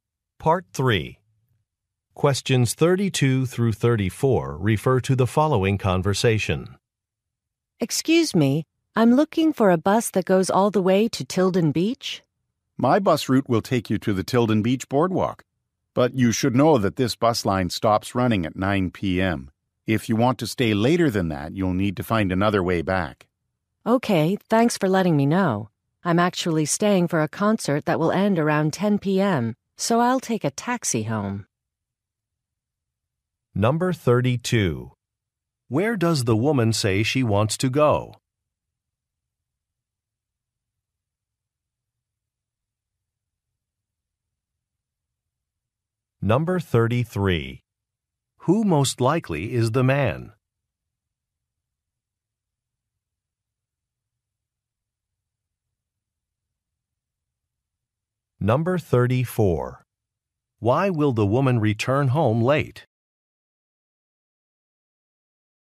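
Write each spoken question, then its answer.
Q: Where does the woman say she wants to go?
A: Tilden Beach

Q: Who most likely is the man?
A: A bus driver

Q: Why will the woman return home late?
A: She is attending a concert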